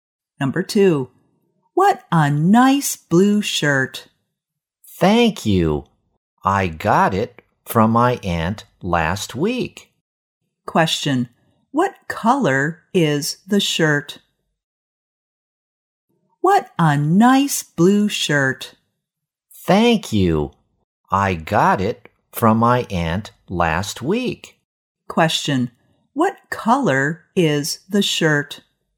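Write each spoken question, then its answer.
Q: What color is the shirt?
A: Blue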